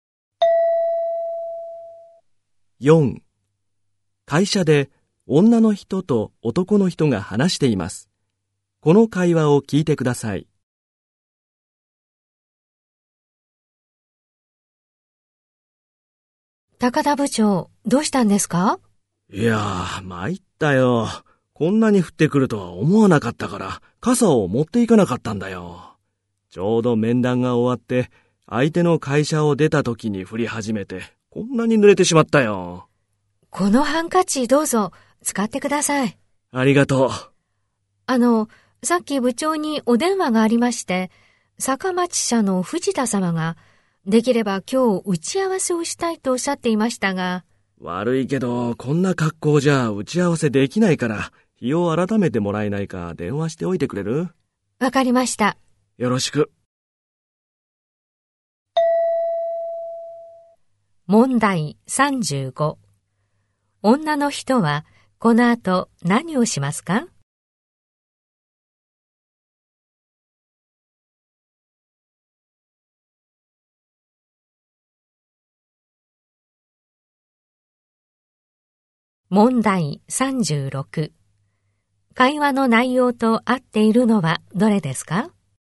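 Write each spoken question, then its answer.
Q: 女の人はこの後何をしますか?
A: 藤田様に電話して打ち合わせの日を改めてもらう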